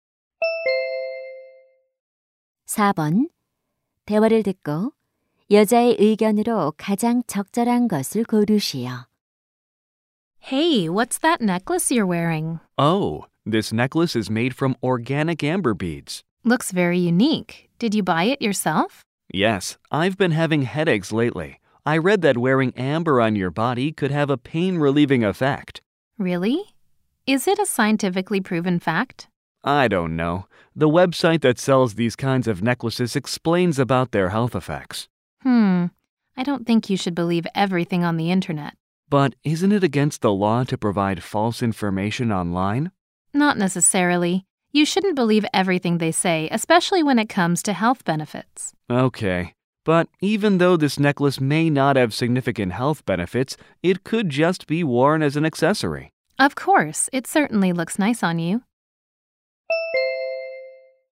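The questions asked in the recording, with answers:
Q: 대화를 듣고 여자의 의견으로 가장 적절한 것을 고르시오.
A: 인터넷의 건강 정보를 모두 믿어서는 안 된다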